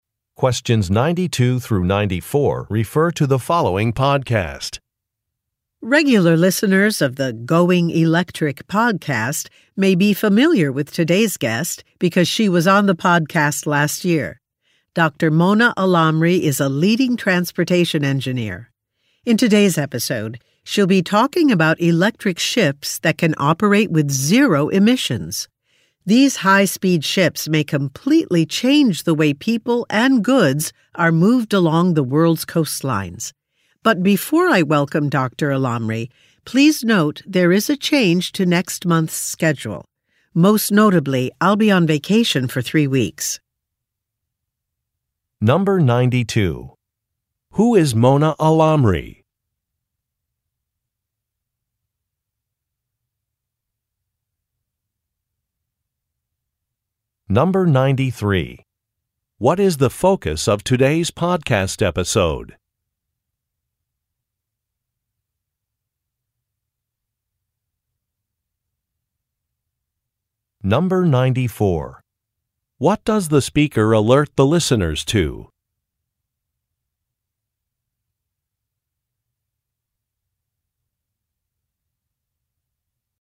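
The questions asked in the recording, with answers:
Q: Who is Mona Alamri?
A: A transportation engineer

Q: What is the focus of today's podcast episode?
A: Electric ships with zero emissions

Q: What does the speaker alert the listeners to?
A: A change to next month's schedule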